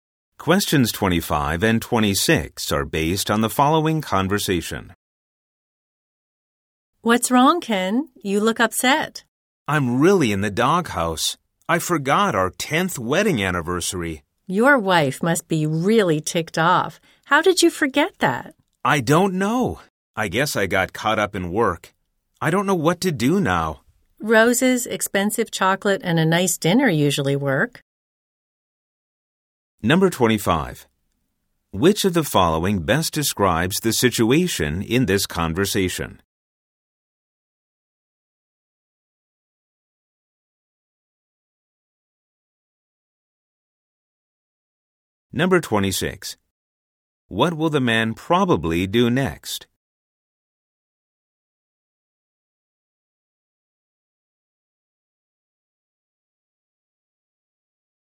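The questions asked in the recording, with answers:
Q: Which of the following best describes the situation in this conversation?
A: The man forgot his wedding anniversary.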